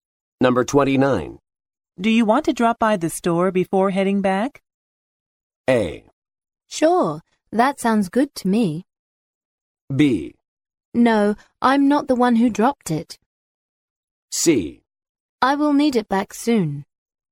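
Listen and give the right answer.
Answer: A: Sure, that sounds good to me.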